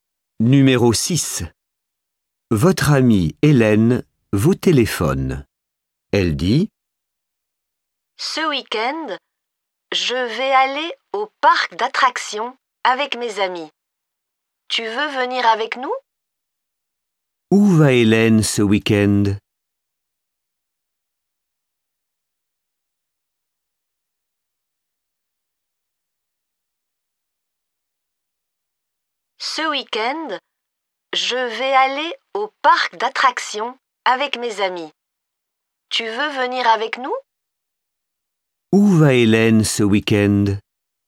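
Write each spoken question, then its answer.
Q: Où va Hélène ce week-end?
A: Au parc d'attractions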